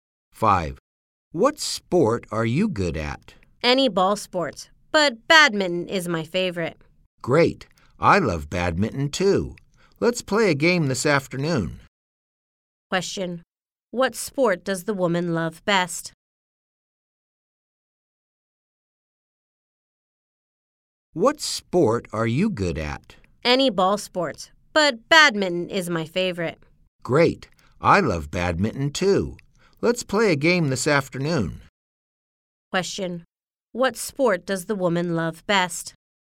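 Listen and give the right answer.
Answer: Badminton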